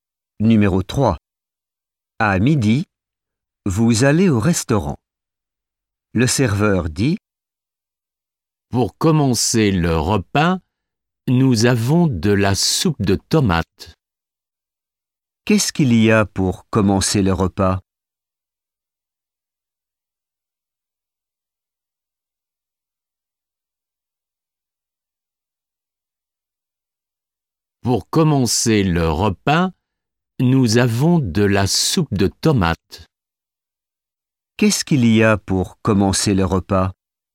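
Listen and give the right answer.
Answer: de la soupe de tomates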